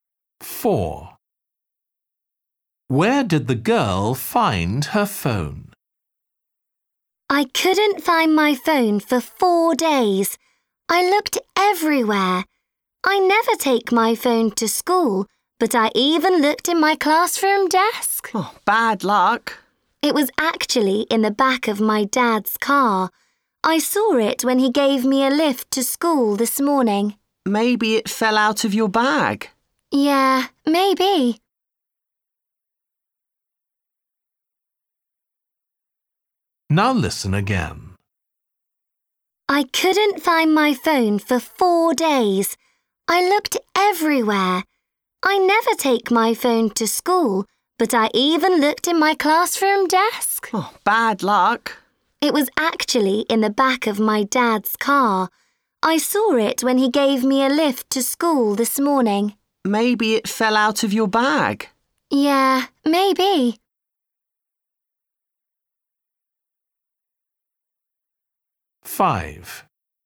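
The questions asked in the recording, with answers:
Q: Where did the girl find her phone?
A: in the back of her dad's car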